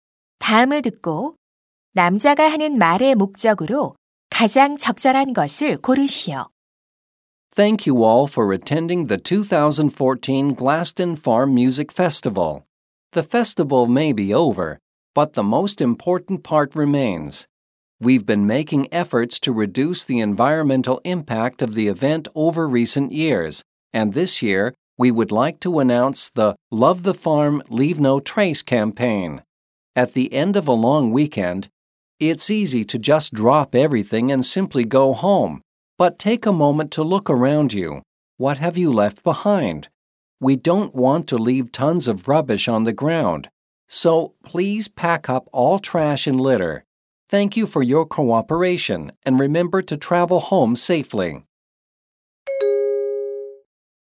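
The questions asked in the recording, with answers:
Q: 다음을 듣고 남자가 하는 말의 목적으로 가장 적절한 것을 고르시오.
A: 축제 참가자들에게 쓰레기를 모두 챙겨 가도록 요청하려고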